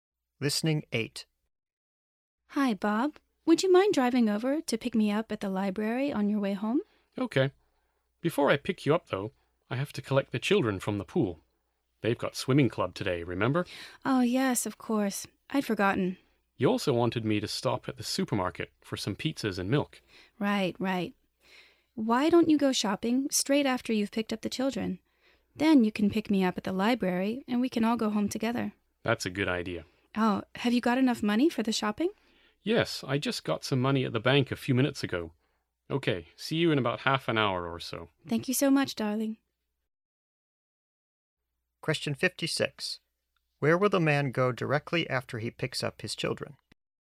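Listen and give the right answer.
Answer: The supermarket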